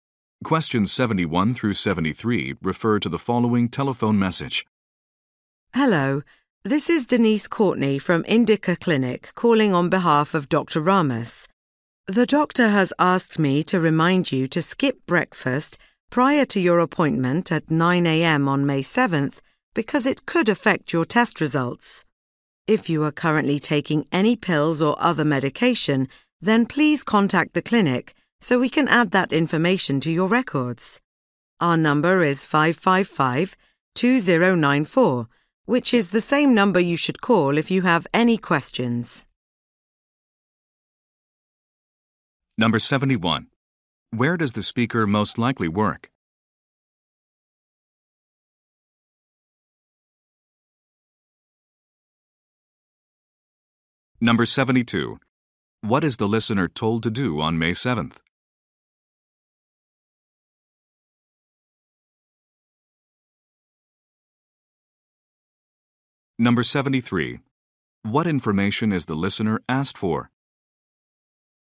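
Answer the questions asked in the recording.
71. At a medical clinic
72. Skip breakfast before the appointment
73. Any medication they are currently taking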